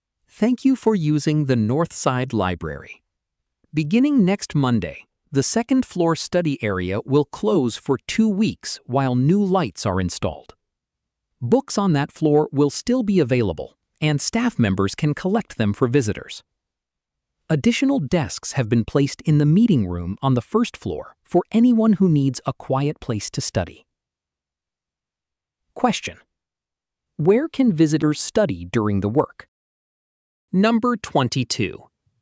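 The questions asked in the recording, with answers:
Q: where can visitors study during the work?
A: In the meeting room on the first floor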